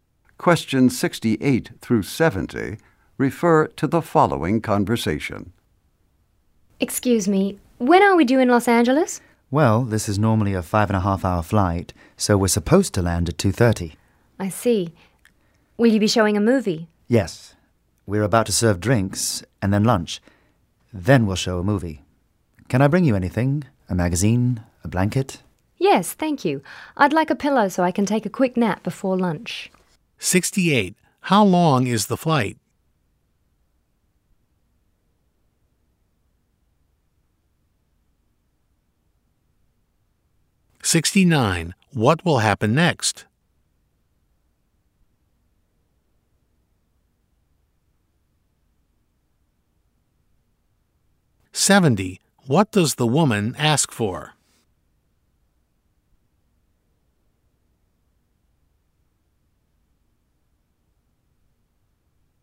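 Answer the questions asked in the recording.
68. 5.5 hours
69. Drinks will be served
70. A pillow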